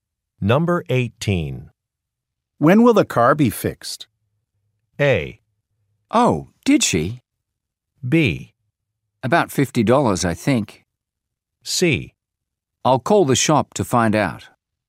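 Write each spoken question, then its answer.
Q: When will the car be fixed?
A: C: I'll call the shop to find out.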